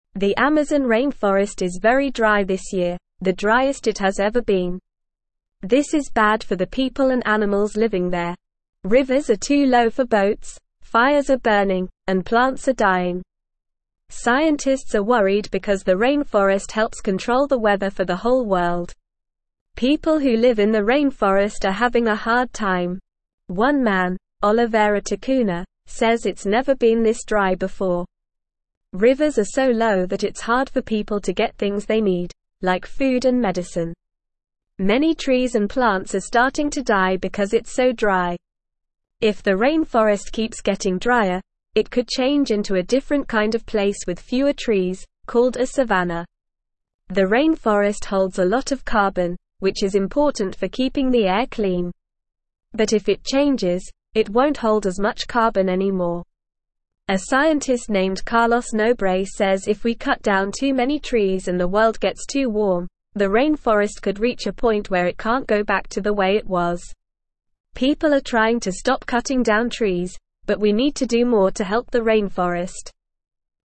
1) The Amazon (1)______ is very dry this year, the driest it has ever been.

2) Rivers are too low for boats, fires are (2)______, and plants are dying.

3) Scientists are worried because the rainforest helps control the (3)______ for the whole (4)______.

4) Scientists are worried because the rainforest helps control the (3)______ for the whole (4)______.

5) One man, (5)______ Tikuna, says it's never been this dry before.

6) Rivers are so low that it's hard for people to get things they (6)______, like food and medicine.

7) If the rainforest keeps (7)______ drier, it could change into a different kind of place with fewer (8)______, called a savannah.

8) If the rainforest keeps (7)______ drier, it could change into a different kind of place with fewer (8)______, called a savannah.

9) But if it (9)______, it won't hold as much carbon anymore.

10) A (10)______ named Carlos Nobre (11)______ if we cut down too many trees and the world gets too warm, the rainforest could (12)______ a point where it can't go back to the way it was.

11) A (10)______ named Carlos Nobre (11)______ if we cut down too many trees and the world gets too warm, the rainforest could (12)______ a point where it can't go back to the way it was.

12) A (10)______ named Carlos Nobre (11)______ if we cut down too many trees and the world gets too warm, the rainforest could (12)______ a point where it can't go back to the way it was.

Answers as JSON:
{"1": "rainforest", "2": "burning", "3": "weather", "4": "world", "5": "Oliveira", "6": "need", "7": "getting", "8": "trees", "9": "changes", "10": "scientist", "11": "says", "12": "reach"}

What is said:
The Amazon rainforest is very dry this year, the driest it has ever been. This is bad for the people and animals living there. Rivers are too low for boats, fires are burning, and plants are dying. Scientists are worried because the rainforest helps control the weather for the whole world.
People who live in the rainforest are having a hard time. One man, Oliveira Tikuna, says it's never been this dry before. Rivers are so low that it's hard for people to get things they need, like food and medicine. Many trees and plants are starting to die because it's so dry.
If the rainforest keeps getting drier, it could change into a different kind of place with fewer trees, called a savannah. The rainforest holds a lot of carbon, which is important for keeping the air clean. But if it changes, it won't hold as much carbon anymore. A scientist named Carlos Nobre says if we cut down too many trees and the world gets too warm, the rainforest could reach a point where it can't go back to the way it was. People are trying to stop cutting down trees, but we need to do more to help the rainforest.

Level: Level 2